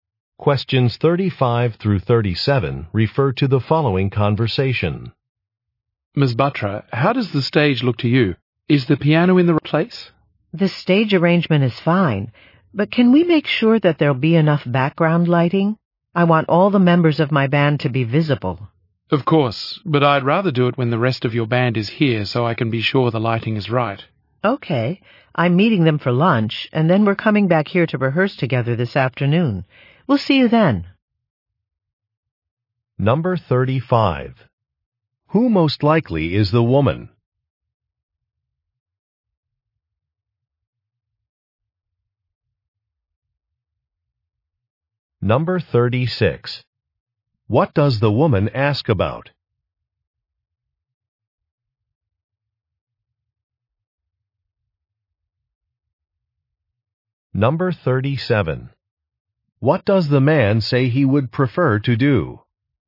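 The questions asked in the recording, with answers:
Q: Who most likely is the woman?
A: A musician leading a band

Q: What does the woman ask about?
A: Background lighting

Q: What does the man say he would prefer to do?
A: Adjust the lighting when the rest of the band is there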